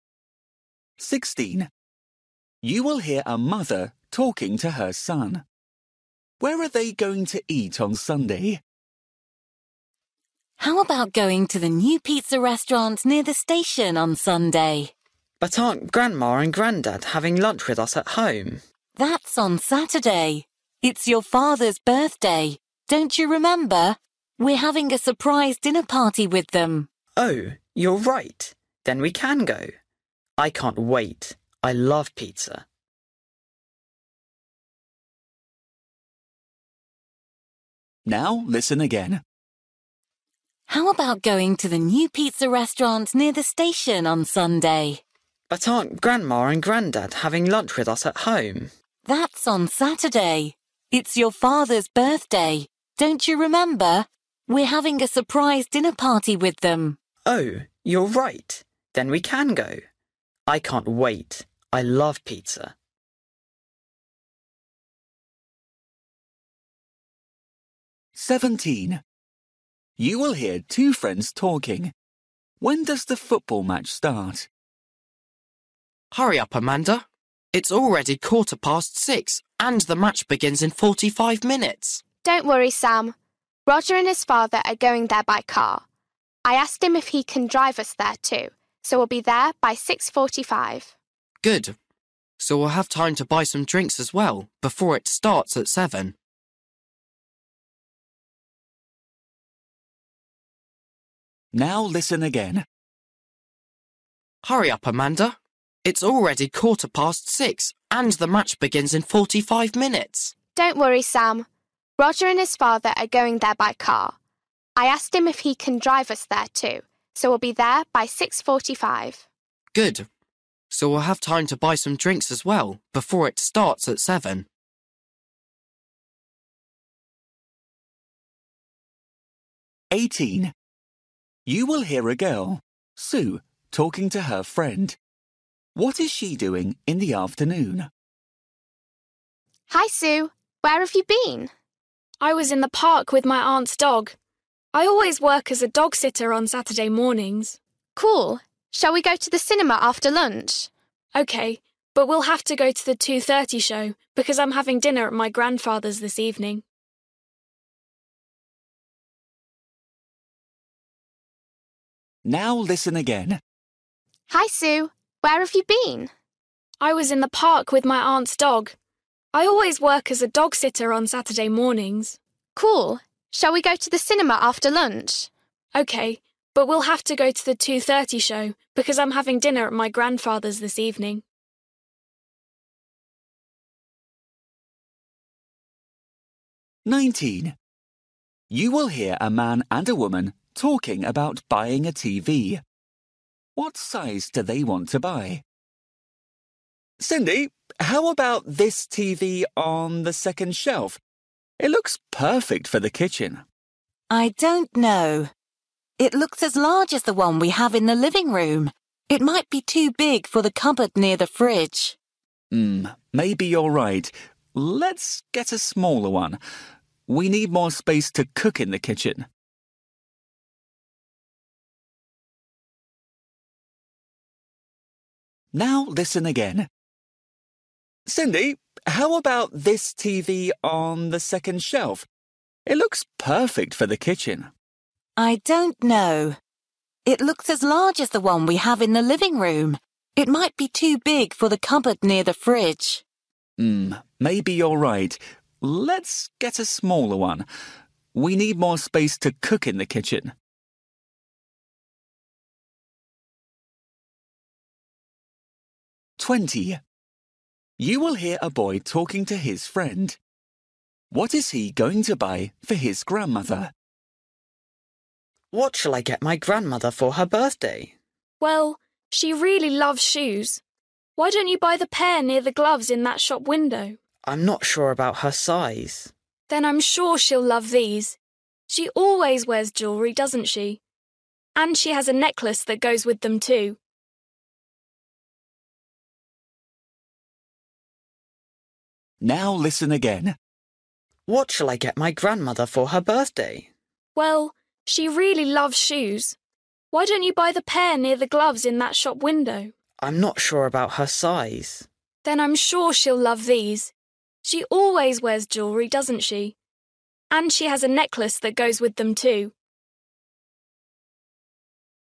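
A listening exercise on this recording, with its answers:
For each question, choose the correct answer.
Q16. You will hear a mother talking to her son. Where are they going to eat on Sunday?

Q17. You will hear two friends talking. When does the football match start?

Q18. You will hear a girl, Sue, talking to her friend. What is she doing in the afternoon?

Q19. You will hear a man and a woman talking about buying a TV. What size do they want to buy?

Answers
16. At the new pizza restaurant near the station
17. At 7 o'clock
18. Going to the cinema
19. A smaller one, to fit in the kitchen

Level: Luyện nghe trình độ A2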